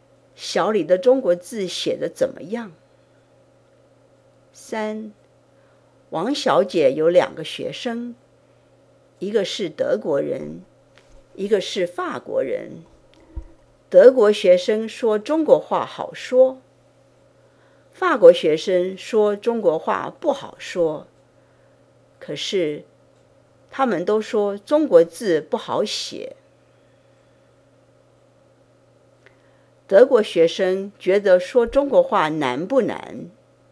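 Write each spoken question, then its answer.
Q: 德国学生觉得说中国话难不难?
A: 不难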